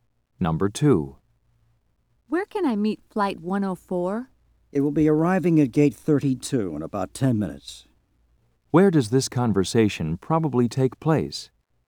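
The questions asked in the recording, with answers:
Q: Where does this conversation probably take place?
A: At an airport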